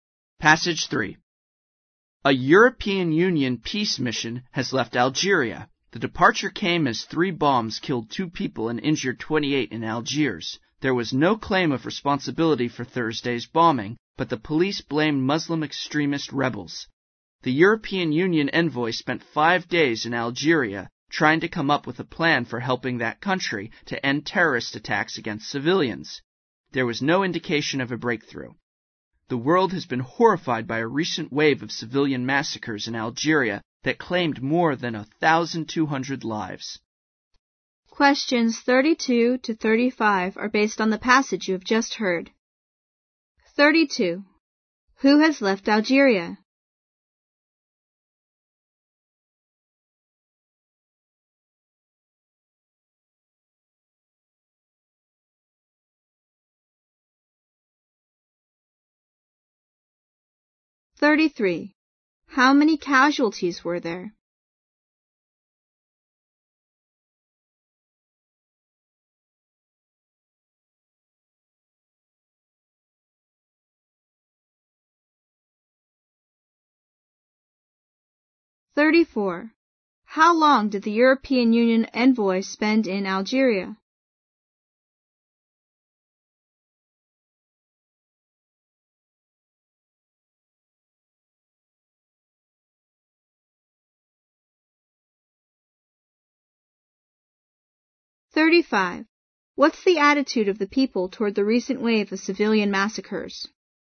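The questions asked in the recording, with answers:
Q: Who has left Algeria?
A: A European Union peace mission

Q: How many casualties were there?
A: 30 (2 killed, 28 injured)

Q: How long did the European Union envoy spend in Algeria?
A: 5 days

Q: What's the attitude of the people toward the recent wave of civilian massacres?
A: Horrified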